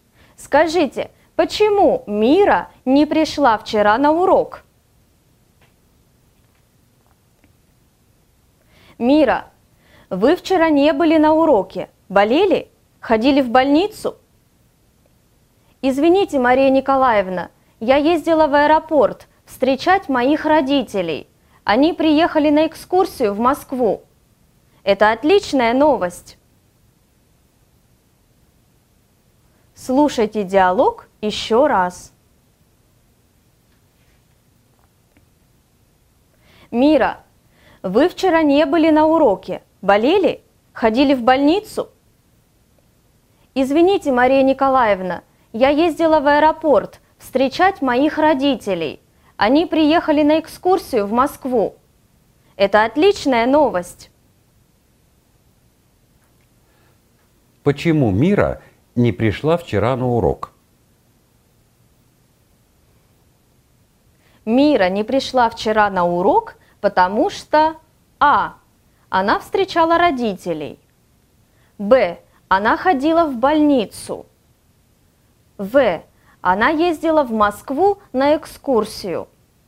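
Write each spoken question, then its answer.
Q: Почему Мира не пришла вчера на урок?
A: А: Она встречала родителей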